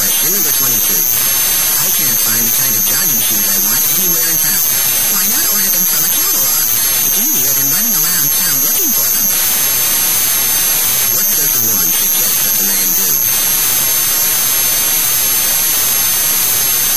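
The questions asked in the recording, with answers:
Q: What does the woman suggest that the man do?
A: Order the shoes from a catalog.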